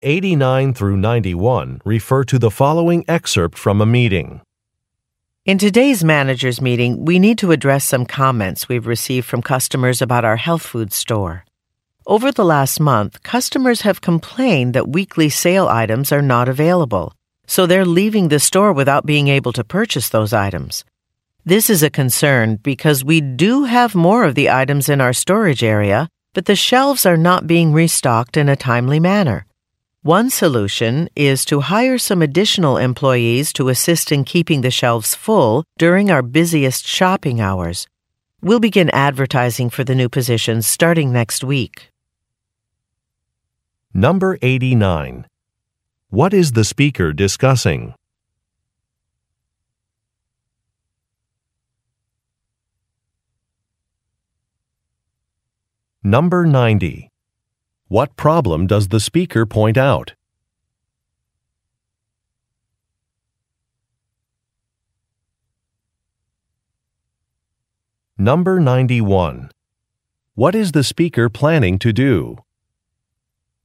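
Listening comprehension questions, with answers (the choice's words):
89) What is the speaker discussing?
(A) A monthly budget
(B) Some new food items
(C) Some customer feedback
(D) A training program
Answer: Some customer feedback

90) What problem does the speaker point out?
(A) Employees have been arriving late.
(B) Uniforms still need to be ordered.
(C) Company profits have been declining.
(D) Certain products cannot be found on the shelves.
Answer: Certain products cannot be found on the shelves.

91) What is the speaker planning to do?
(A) Publicize an upcoming sale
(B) Hire more staff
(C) Improve recycling procedures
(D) Meet with individual employees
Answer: Hire more staff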